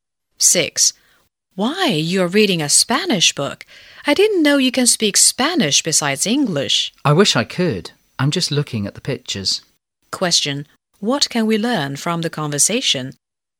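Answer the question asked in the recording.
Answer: The woman can't speak Spanish; she is only looking at the pictures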